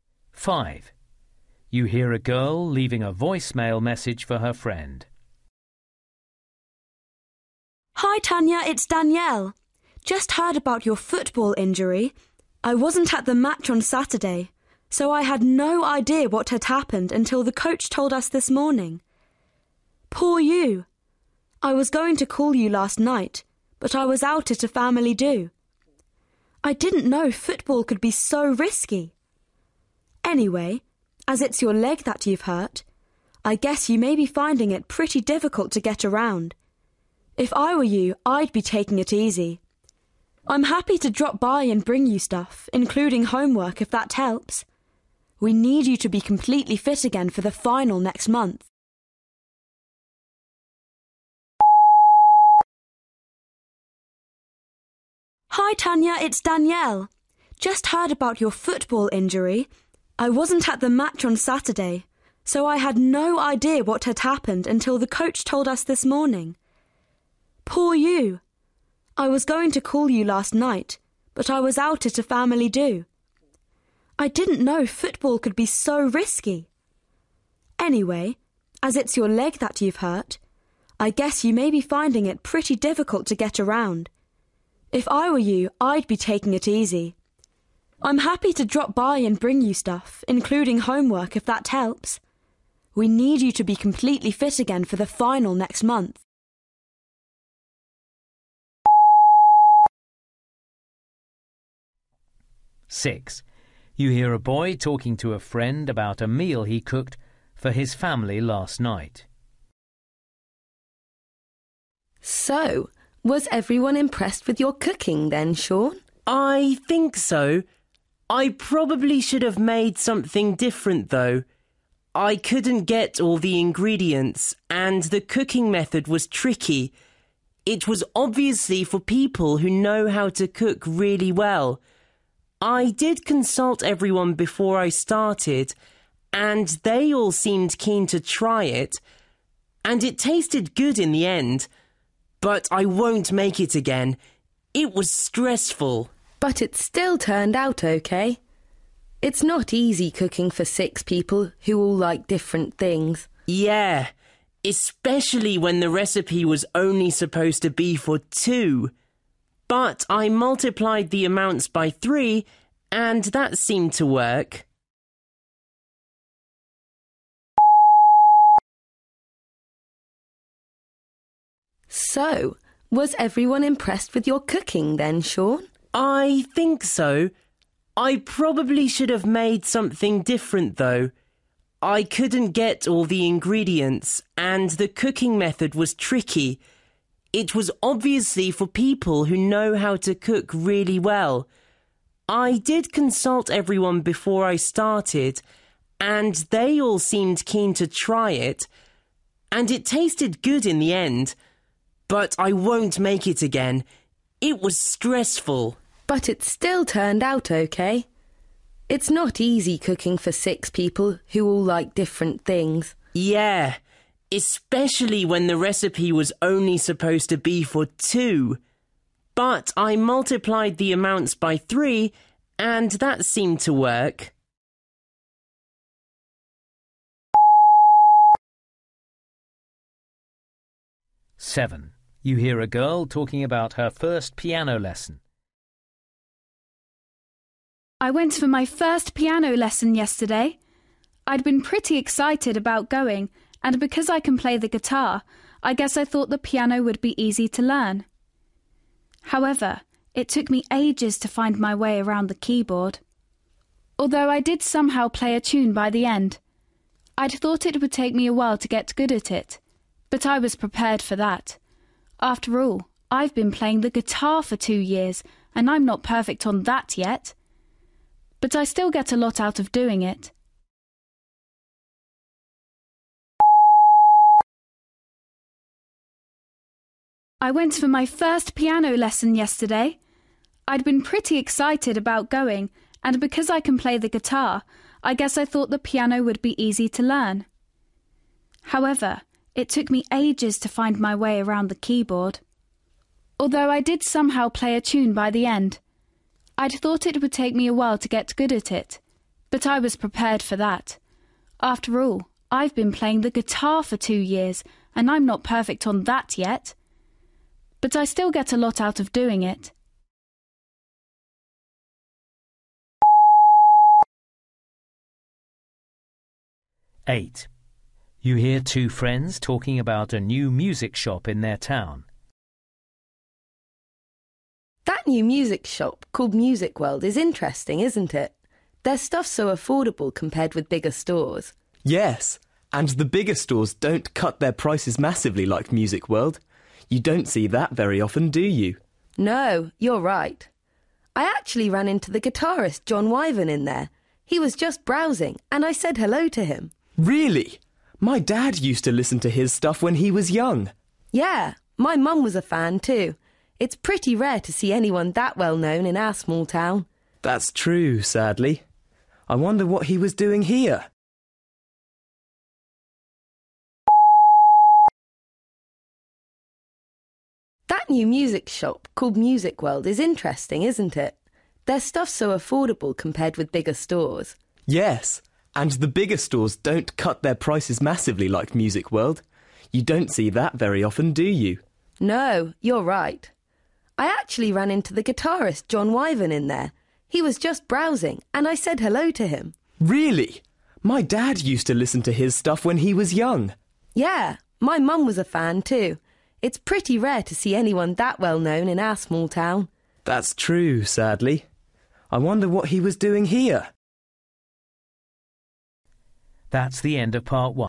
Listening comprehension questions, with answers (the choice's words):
You will hear people talking in eight different situations. For questions 1-8, choose the best answer (A, B or C).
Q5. You hear a girl leaving a voicemail message for her friend. Why is she calling her?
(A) to apologise for not ringing her as arranged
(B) to propose ways of helping her while she's off sick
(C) to try and find out the details of her injury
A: to propose ways of helping her while she's off sick

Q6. You hear a boy talking to a friend about a meal he cooked for his family last night. What does he admit about the meal?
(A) He hadn't realised how little food the recipe would make.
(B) He should have checked that his family would like the meal.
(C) He was too ambitious in his choice of recipe.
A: He was too ambitious in his choice of recipe.

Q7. You hear a girl talking about her first piano lesson. How did she feel about it?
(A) confident that she'd pick it up quickly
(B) concerned at the extent of the task ahead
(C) surprised at how unfamiliar the instrument was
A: surprised at how unfamiliar the instrument was

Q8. You hear two friends talking about a new music shop in their town. What do they think is unusual about the shop?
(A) It offers huge reductions on some items.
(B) It stocks music from their parents' era.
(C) It has regular visits from famous musicians.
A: It offers huge reductions on some items.

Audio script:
Danielle: Hi Tanya, it's Danielle. Just heard about your football injury. I wasn't at the match on Saturday, so I had no idea what had happened until the coach told us this morning. Poor you! I was going to call you last night, but I was out at a family do. I didn't know football could be so risky! Anyway, as it's your leg that you've hurt, I guess you may be finding it pretty difficult to get around. If I were you, I'd be taking it easy! I'm happy to drop by and bring you stuff – including homework – if that helps! We need you to be completely fit again for the final next month!
Alysha: So, was everyone impressed with your cooking, then Sean?
Sean: I think so. I probably should have made something different, though. I couldn't get all the ingredients, and the cooking method was tricky – it was obviously for people who know how to cook really well. I did consult everyone before I started, and they all seemed keen to try it – and it tasted good in the end. But I won't make it again – it was stressful!
Alysha: But it still turned out OK! It's not easy cooking for six people who all like different things.
Sean: Yeah – especially when the recipe was only supposed to be for two! But I multiplied the amounts by three and that seemed to work!
I went for my first piano lesson yesterday! I'd been pretty excited about going, and because I can play the guitar, I guess I thought the piano would be easy to learn. However, it took me ages to find my way around the keyboard, although I did somehow play a tune by the end. I'd thought it would take me a while to get good at it, but I was prepared for that – after all, I've been playing the guitar for two years, and I'm not perfect on that yet! But I still get a lot out of doing it.
Heidi: That new music shop called Music World is interesting, isn't it? Their stuff's so affordable compared with bigger stores.
Rob: Yes, and the bigger stores don't cut their prices massively like Music World. You don't see that very often, do you?
Heidi: No, you're right. I actually ran into the guitarist Jon Wyvern in there. He was just browsing and I said hello to him.
Rob: Really? My dad used to listen to his stuff when he was young!
Heidi: Yeah, my mum was a fan too. It's pretty rare to see anyone that well known in our small town.
Rob: That's true, sadly. I wonder what he was doing here?

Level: B2